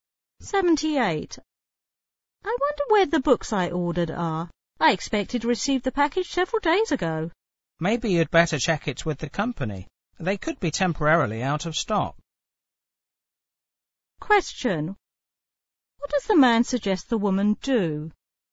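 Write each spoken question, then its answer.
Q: What does the man suggest the woman do?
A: Check with the company about the order.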